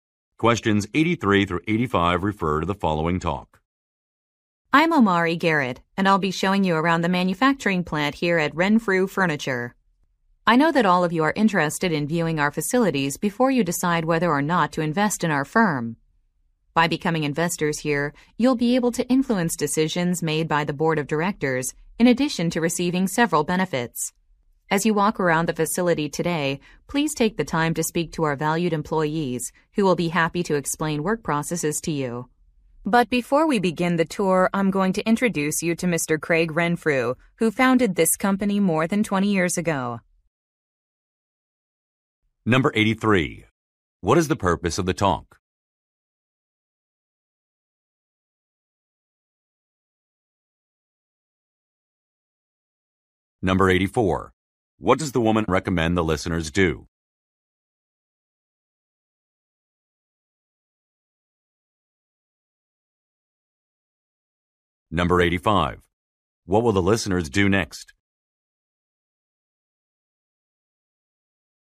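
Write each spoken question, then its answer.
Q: What is the purpose of the talk?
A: To give a tour to potential investors

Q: What will the listeners do next?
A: Meet the company founder, Craig Renfrew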